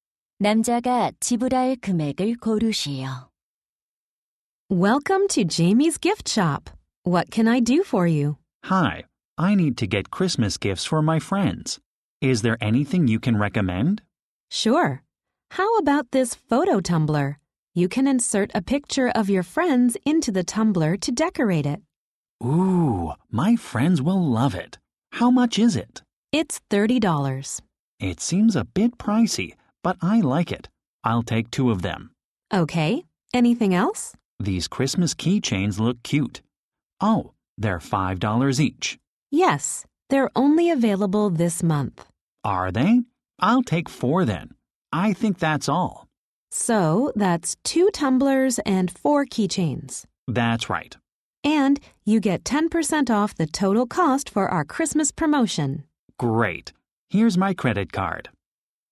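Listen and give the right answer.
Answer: 72달러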